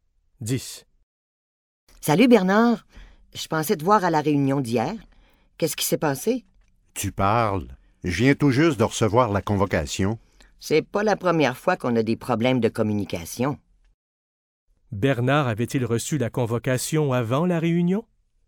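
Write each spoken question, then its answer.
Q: Bernard avait-il reçu la convocation avant la réunion?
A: Non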